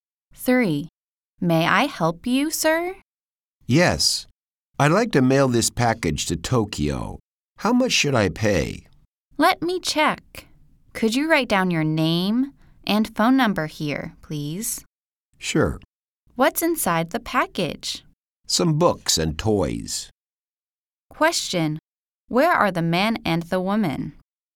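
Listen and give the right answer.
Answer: At a post office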